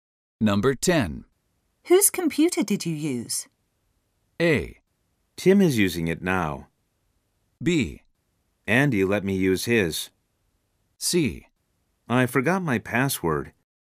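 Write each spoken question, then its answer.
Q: Whose computer did you use?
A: B: Andy let me use his.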